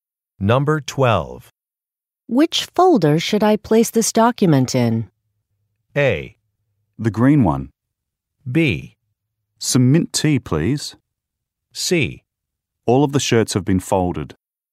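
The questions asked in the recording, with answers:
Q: Which folder should I place this document in?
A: A: The green one.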